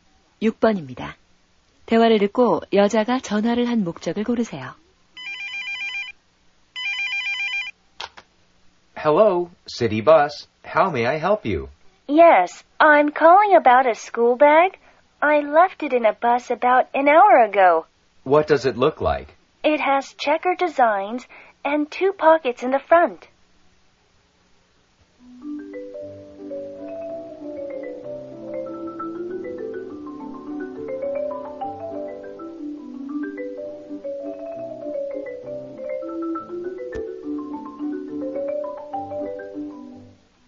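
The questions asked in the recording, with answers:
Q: 대화를 듣고 여자가 전화를 한 목적을 고르세요.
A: 버스에 두고 내린 가방을 찾으려고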